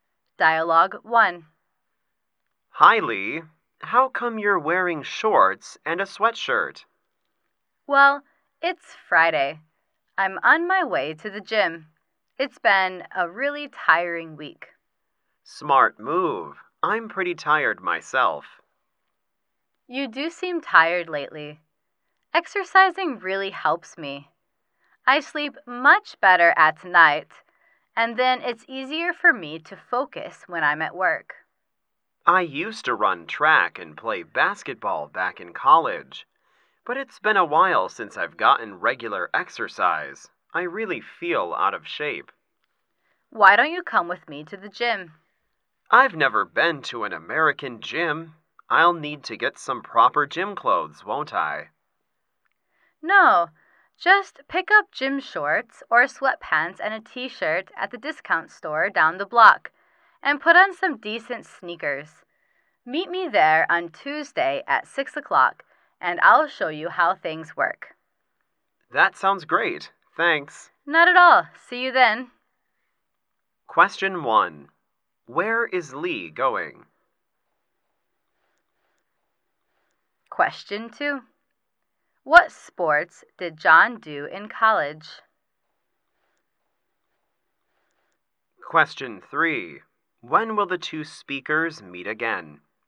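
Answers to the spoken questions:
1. To the gym
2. Track and basketball
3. On Tuesday at 6 o'clock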